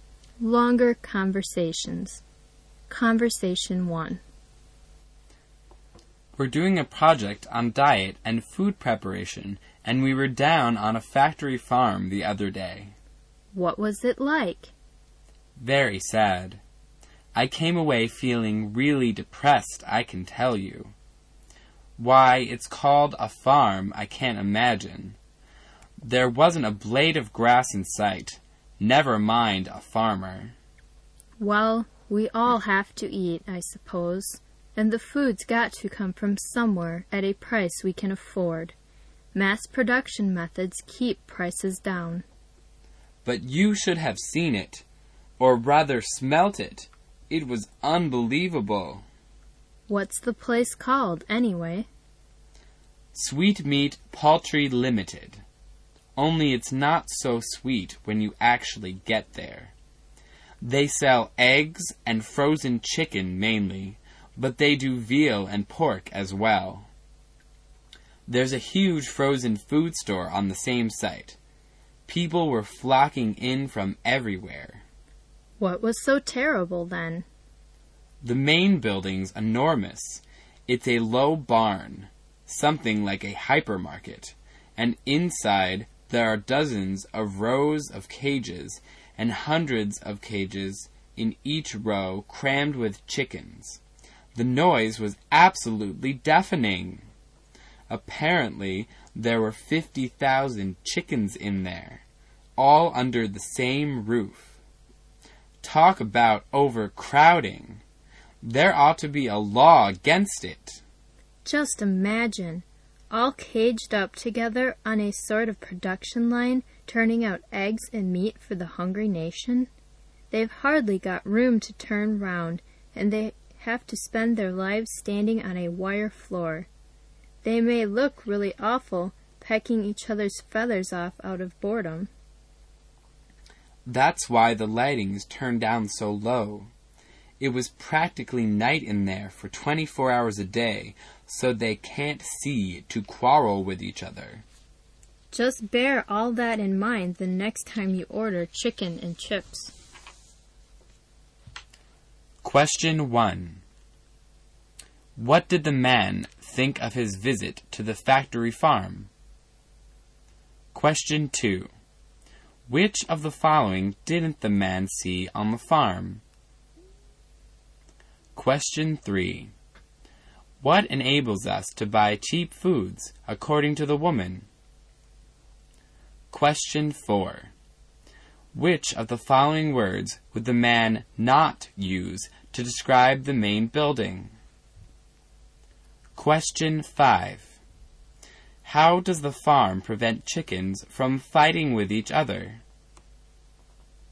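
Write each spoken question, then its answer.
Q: What did the man think of his visit to the factory farm?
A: It was very sad and depressing

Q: What enables us to buy cheap foods, according to the woman?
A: Mass production methods

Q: How does the farm prevent chickens from fighting with each other?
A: By keeping the lighting turned down very low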